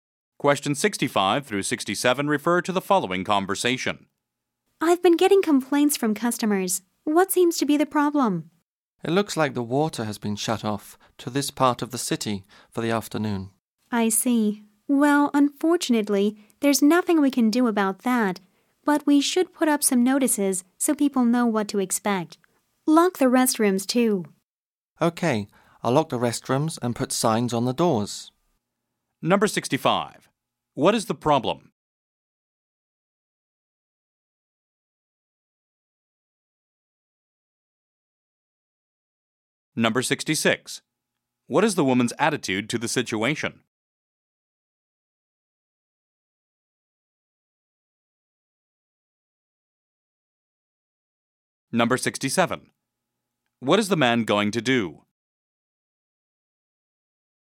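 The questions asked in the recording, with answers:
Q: What is the problem?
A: The water has been shut off

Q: What is the man going to do?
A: Lock the restrooms and put signs on the doors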